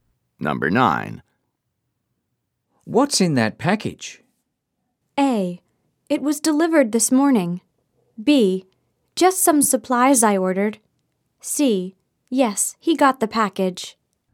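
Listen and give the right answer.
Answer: B: Just some supplies I ordered.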